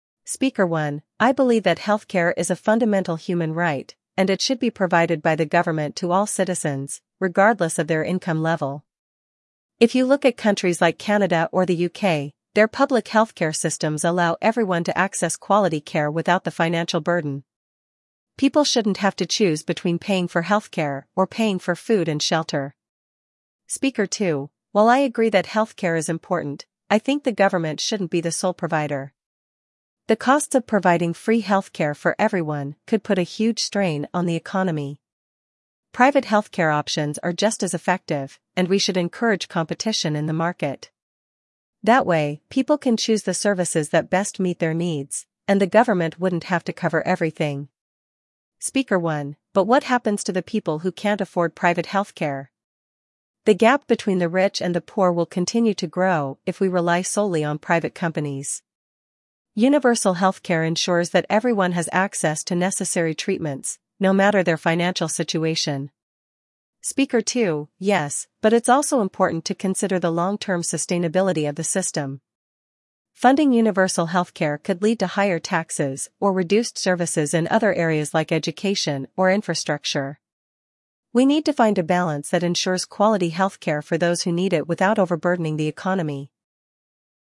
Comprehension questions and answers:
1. What is Speaker 1's main argument for universal healthcare?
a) It would be too expensive for the government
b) It would reduce the quality of healthcare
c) Healthcare should be available to everyone, regardless of income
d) Private healthcare is more efficient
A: c) Healthcare should be available to everyone, regardless of income

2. What does Speaker 2 believe about private healthcare?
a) It should be eliminated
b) It is just as effective as government healthcare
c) It needs more regulation from the government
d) It is only for the wealthy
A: b) It is just as effective as government healthcare

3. How does Speaker 1 feel about the gap between rich and poor?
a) It should be widened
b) It should remain the same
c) It will grow if private healthcare is relied upon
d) It will shrink with universal healthcare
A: c) It will grow if private healthcare is relied upon

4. What concern does Speaker 2 raise about funding for universal healthcare?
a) The government would be forced to cut taxes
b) The costs could put a strain on the economy and lead to reduced services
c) Universal healthcare is not practical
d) Private healthcare options would become too expensive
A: b) The costs could put a strain on the economy and lead to reduced services

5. What solution does Speaker 2 propose?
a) Completely removing private healthcare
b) Relying solely on government-provided healthcare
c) Finding a balance between private and public healthcare options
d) Offering free healthcare only to certain groups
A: c) Finding a balance between private and public healthcare options

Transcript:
Speaker 1: "I believe that healthcare is a fundamental human right, and it should be provided by the government to all citizens, regardless of their income level. If you look at countries like Canada or the UK, their public healthcare systems allow everyone to access quality care without the financial burden. People shouldn't have to choose between paying for healthcare or paying for food and shelter."
Speaker 2: "While I agree that healthcare is important, I think the government shouldn't be the sole provider. The costs of providing free healthcare for everyone could put a huge strain on the economy. Private healthcare options are just as effective, and we should encourage competition in the market. That way, people can choose the services that best meet their needs, and the government wouldn't have to cover everything."
Speaker 1: "But what happens to the people who can't afford private healthcare? The gap between the rich and the poor will continue to grow if we rely solely on private companies. Universal healthcare ensures that everyone has access to necessary treatments, no matter their financial situation."
Speaker 2: "Yes, but it's also important to consider the long-term sustainability of the system. Funding universal healthcare could lead to higher taxes or reduced services in other areas like education or infrastructure. We need to find a balance that ensures quality healthcare for those who need it without overburdening the economy."

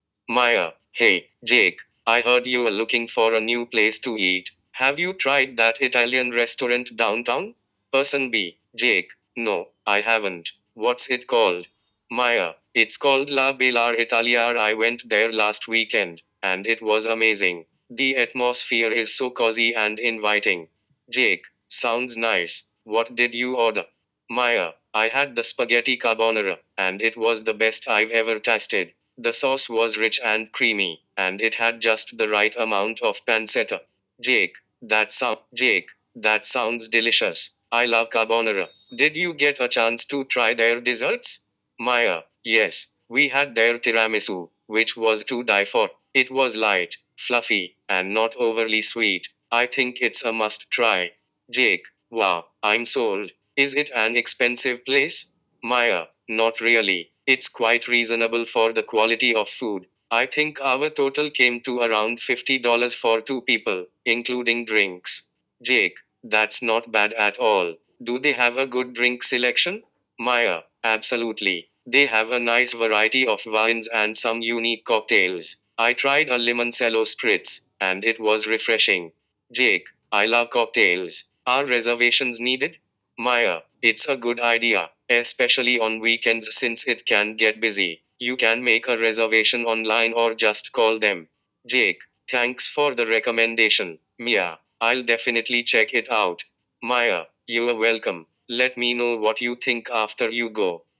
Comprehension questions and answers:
You will hear the audio only once, so focus on key details. After listening, select the best answer for each question.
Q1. What is the name of the restaurant Mia recommends?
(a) Italian Bistro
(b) La Bella Italia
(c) Ristorante Roma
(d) Pizza Palace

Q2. What did Mia order at the restaurant?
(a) Lasagna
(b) Spaghetti carbonara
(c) Fettuccine Alfredo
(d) Ravioli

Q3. How did Mia describe the atmosphere of the restaurant?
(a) Loud and busy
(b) Cozy and inviting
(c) Formal and cold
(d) Dark and uncomfortable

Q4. What dessert did Mia try?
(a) Cheesecake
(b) Tiramisu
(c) Panna cotta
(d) Gelato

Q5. How much did Mia and her friend spend at the restaurant?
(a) $30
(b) $50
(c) $70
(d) $90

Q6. What drink did Mia mention trying?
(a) Sangria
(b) Mojito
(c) Limoncello spritz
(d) Margarita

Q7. Is the restaurant considered expensive?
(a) Yes, very expensive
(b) No, quite reasonable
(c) Only for lunch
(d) Only for dinner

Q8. What does Mia recommend about making reservations?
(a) It's not necessary at all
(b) Only needed for large groups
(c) It's a good idea, especially on weekends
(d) They only accept walk-ins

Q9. How did Mia feel about the carbonara she ordered?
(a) It was too salty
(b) It was the best she had ever tasted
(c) It was average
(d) It was undercooked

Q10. What does Jake plan to do after hearing Mia's recommendation?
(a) Ignore it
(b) Visit the restaurant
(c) Cook Italian food at home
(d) Go to a different restaurant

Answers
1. (b) La Bella Italia
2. (b) Spaghetti carbonara
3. (b) Cozy and inviting
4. (b) Tiramisu
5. (b) $50
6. (c) Limoncello spritz
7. (b) No, quite reasonable
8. (c) It's a good idea, especially on weekends
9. (b) It was the best she had ever tasted
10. (b) Visit the restaurant

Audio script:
[Person A: Mia]
Hey, Jake! I heard you're looking for a new place to eat. Have you tried that Italian restaurant downtown?
[Person B: Jake]
No, I haven't. What's it called?
[Mia]
It's called "La Bella Italia." I went there last weekend, and it was amazing! The atmosphere is so cozy and inviting.
[Jake]
Sounds nice! What did you order?
[Mia]
I had the spaghetti carbonara, and it was the best I've ever tasted. The sauce was rich and creamy, and it had just the right amount of pancetta.
[Jake]
That sounds delicious! I love carbonara. Did you get a chance to try their desserts?
[Mia]
Yes! We had their tiramisu, which was to die for. It was light, fluffy, and not overly sweet. I think it's a must-try!
[Jake]
Wow, I'm sold! Is it an expensive place?
[Mia]
Not really. It's quite reasonable for the quality of food. I think our total came to around $50 for two people, including drinks.
[Jake]
That's not bad at all. Do they have a good drink selection?
[Mia]
Absolutely! They have a nice variety of wines and some unique cocktails. I tried a limoncello spritz, and it was refreshing.
[Jake]
I love cocktails! Are reservations needed?
[Mia]
It's a good idea, especially on weekends since it can get busy. You can make a reservation online or just call them.
[Jake]
Thanks for the recommendation, Mia! I'll definitely check it out.
[Mia]
You're welcome! Let me know what you think after you go!

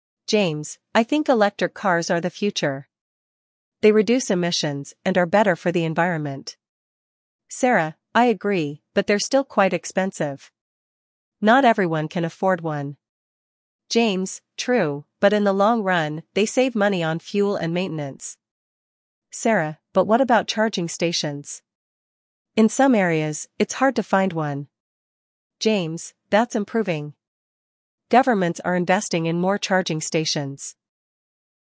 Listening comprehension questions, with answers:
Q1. What does James like about electric cars?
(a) They are stylish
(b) They reduce emissions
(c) They are cheaper to buy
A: (b) They reduce emissions

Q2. What is Sarah's main concern?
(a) High cost of electric cars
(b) Slow speed of electric cars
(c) Safety concerns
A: (a) High cost of electric cars

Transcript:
James: I think electric cars are the future. They reduce emissions and are better for the environment.
Sarah: I agree, but they're still quite expensive. Not everyone can afford one.
James: True, but in the long run, they save money on fuel and maintenance.
Sarah: But what about charging stations? In some areas, it's hard to find one.
James: That's improving. Governments are investing in more charging stations.

